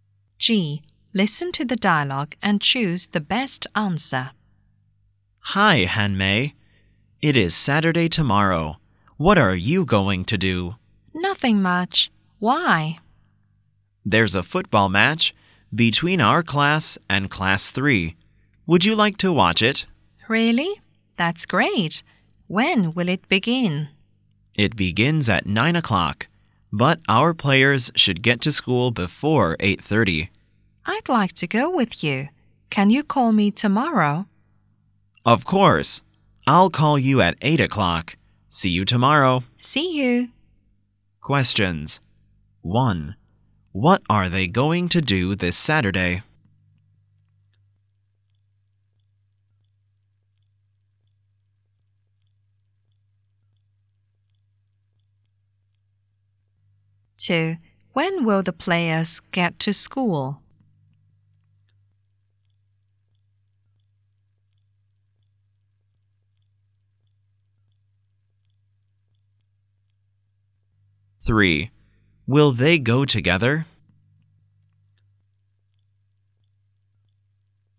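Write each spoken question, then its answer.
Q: What are they going to do this Saturday?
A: Watch a football match

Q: When will the players get to school?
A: Before 8:30

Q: Will they go together?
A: Yes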